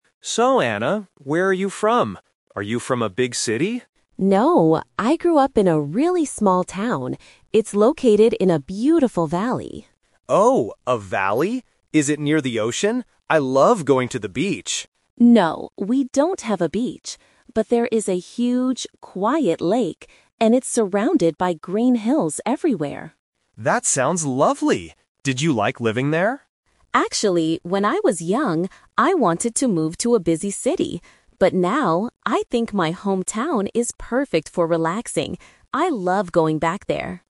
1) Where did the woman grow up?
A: In a small town in a valley.

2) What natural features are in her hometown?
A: Green hills and a lake.

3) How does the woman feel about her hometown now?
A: She thinks it is a great place to relax.

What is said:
Man: So, Anna, where are you from? Are you from a big city?
Woman: No, I grew up in a really small town. It's located in a beautiful valley.
Man: Oh, a valley? Is it near the ocean? I love going to the beach.
Woman: No, we don't have a beach. But there is a huge, quiet lake. And it's surrounded by green hills everywhere.
Man: That sounds lovely! Did you like living there?
Woman: Actually, when I was young, I wanted to move to a busy city. But now, I think my hometown is perfect for relaxing. I love going back there.